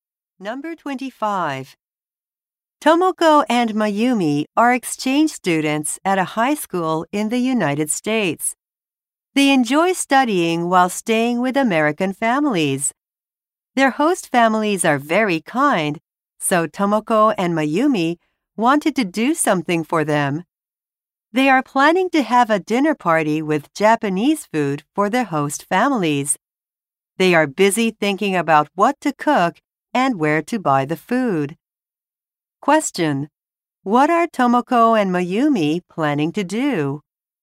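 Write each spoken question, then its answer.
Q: What are Tomoko and Mayumi planning to do?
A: Have a Japanese food dinner party for their host families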